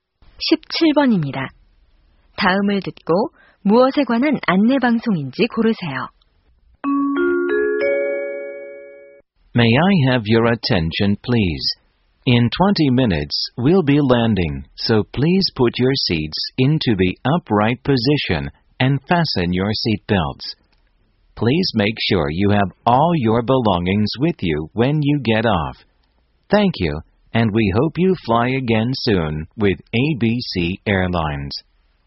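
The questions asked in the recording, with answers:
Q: 다음을 듣고 무엇에 관한 안내 방송인지 고르세요.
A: 비행기 착륙 안내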